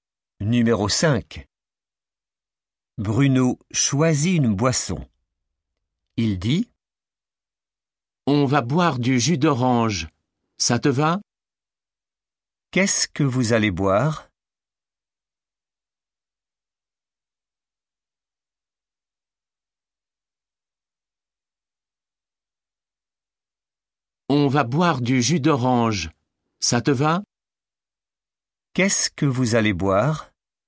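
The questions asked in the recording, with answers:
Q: Qu'est-ce que vous allez boire ?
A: du jus d'orange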